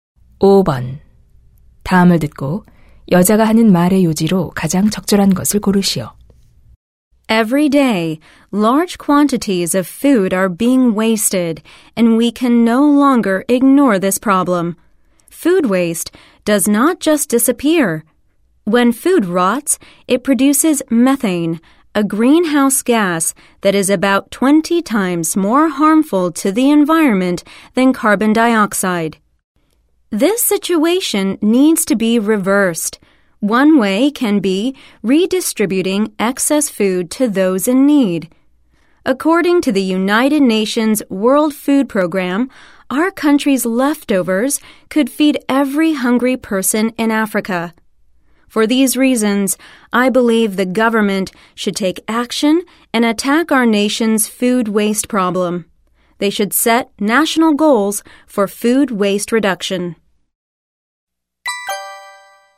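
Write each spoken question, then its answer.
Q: 다음을 듣고 여자가 하는 말의 요지로 가장 적절한 것을 고르시오.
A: 정부가 음식물 쓰레기 문제 해결에 나서야 한다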